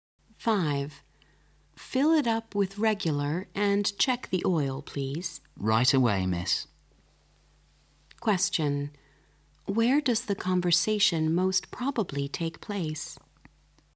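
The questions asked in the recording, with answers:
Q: Where does the conversation most probably take place?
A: At a gas station.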